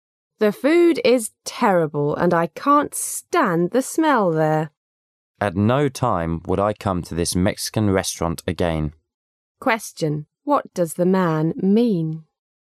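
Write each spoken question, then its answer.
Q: What does the man mean?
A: He will never come to this Mexican restaurant again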